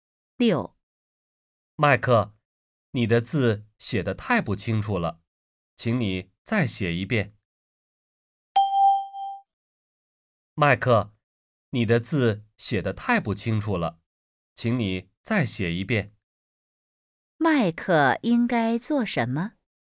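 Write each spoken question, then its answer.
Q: 麦克应该做什么?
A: 再写一遍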